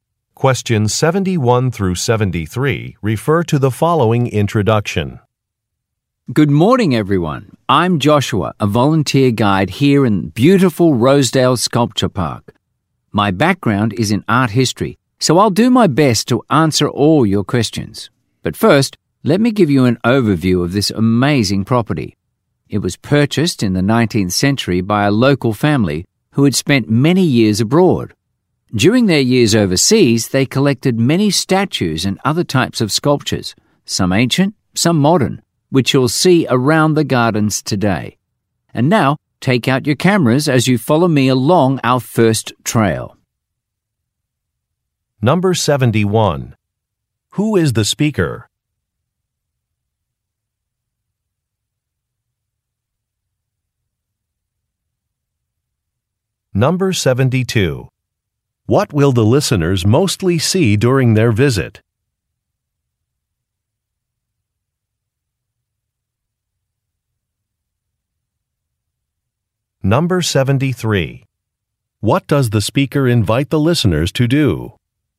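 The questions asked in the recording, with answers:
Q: Who is the speaker?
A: A volunteer tour guide at a sculpture park

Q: What will the listeners mostly see during their visit?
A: Statues and other sculptures

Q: What does the speaker invite the listeners to do?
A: Take out their cameras and follow him along the first trail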